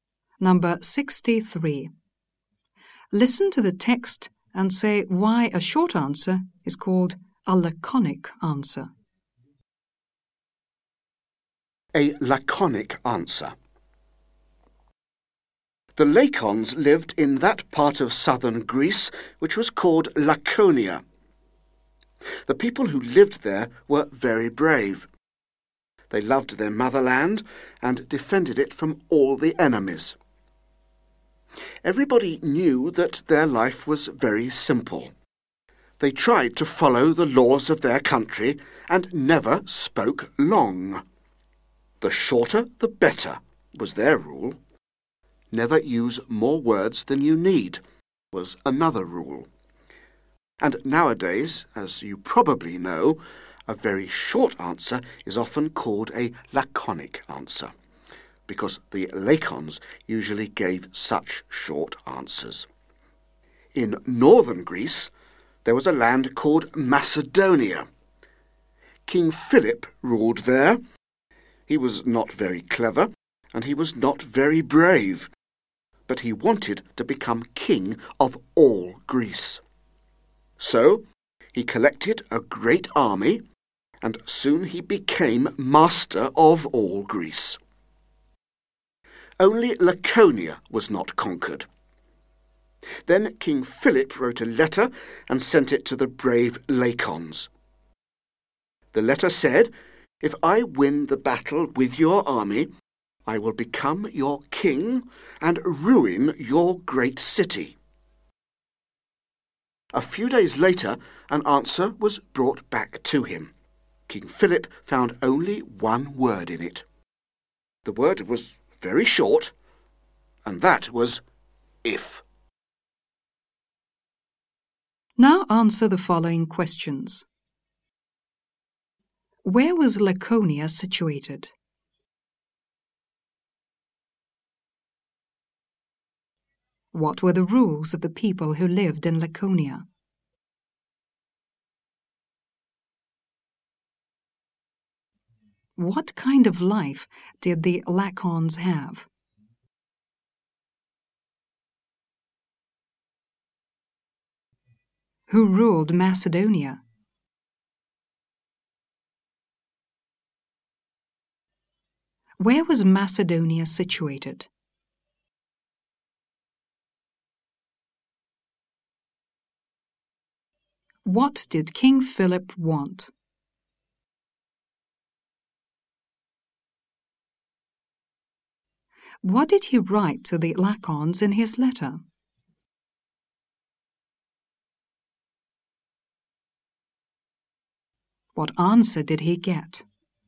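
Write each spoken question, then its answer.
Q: Listen to the text and say why a short answer is called a laconic answer.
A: Because the Lacons usually gave such short answers

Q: Where was Laconia situated?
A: In southern Greece

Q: What were the rules of the people who lived in Laconia?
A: The shorter, the better; never use more words than you need

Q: What kind of life did the Lacons have?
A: A very simple life

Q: Who ruled Macedonia?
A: King Philip

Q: Where was Macedonia situated?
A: In northern Greece

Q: What did King Philip want?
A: To become king of all Greece

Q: What did he write to the Lacons in his letter?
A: If I win the battle with your army, I will become your king and ruin your great city

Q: What answer did he get?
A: Only one word: if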